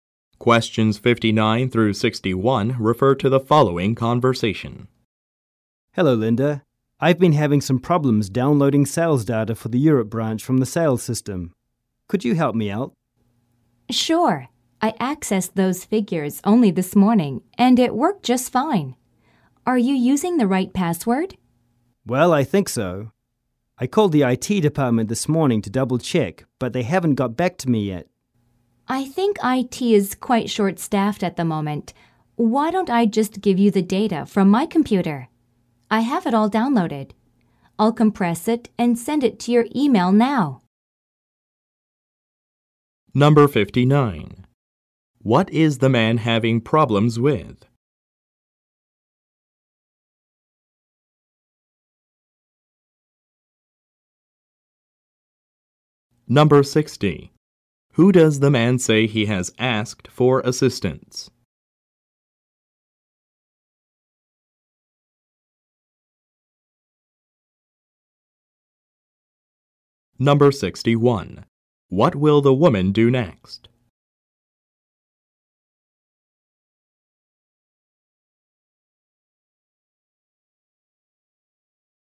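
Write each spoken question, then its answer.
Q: What is the man having problems with?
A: Downloading sales data for the Europe branch from the sales system

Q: Who does the man say he has asked for assistance?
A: The IT department

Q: What will the woman do next?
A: Compress the data and email it to him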